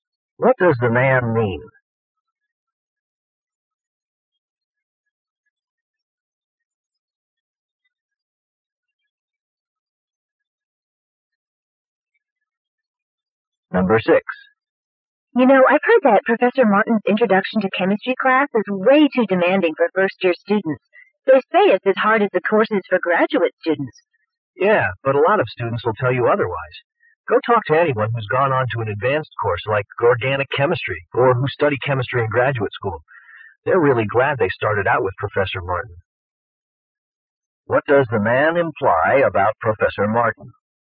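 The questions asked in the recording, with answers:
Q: What does the man imply about Professor Martin?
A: His demanding class prepares students well for advanced chemistry.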